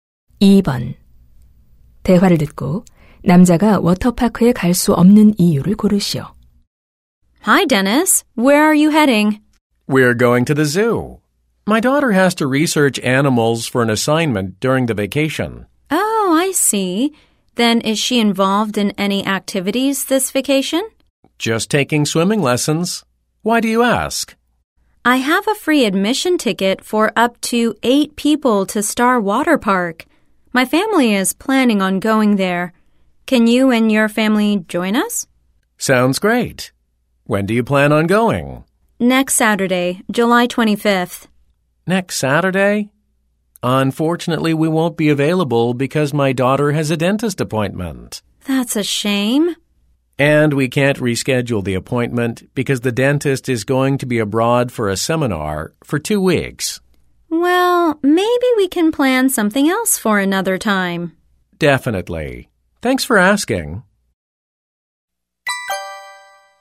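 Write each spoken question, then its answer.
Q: 대화를 듣고 남자가 워터파크에 갈 수 없는 이유를 고르시오.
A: 딸의 치과 예약 때문에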